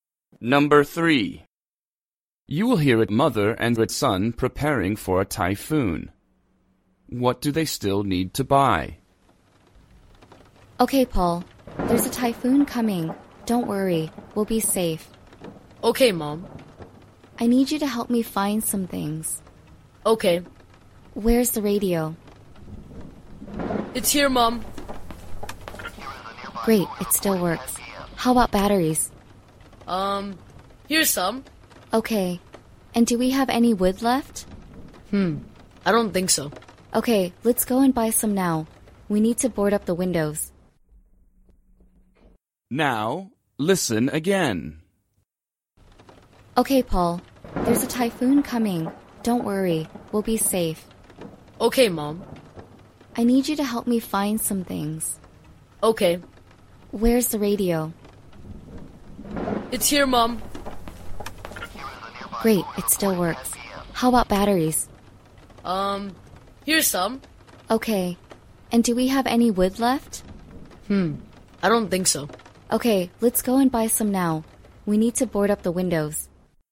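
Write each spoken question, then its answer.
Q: What do they still need to buy?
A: Wood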